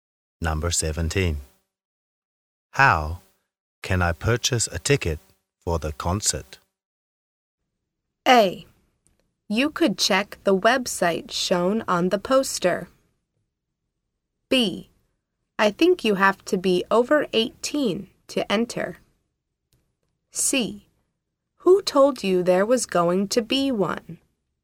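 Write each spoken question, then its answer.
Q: How can I purchase a ticket for the concert?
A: A: You could check the website shown on the poster.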